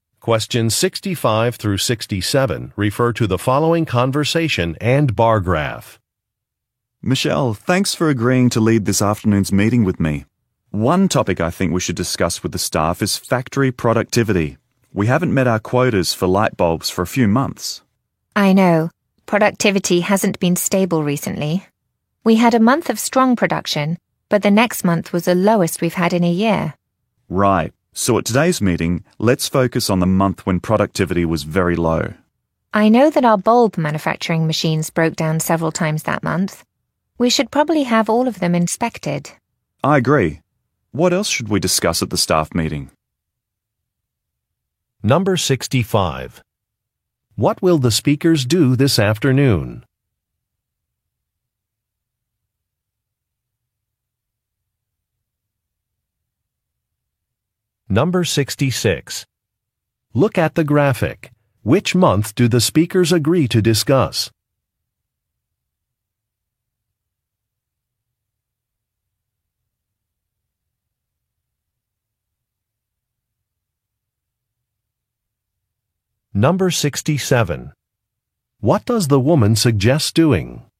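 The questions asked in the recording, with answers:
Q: What will the speakers do this afternoon?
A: Lead a staff meeting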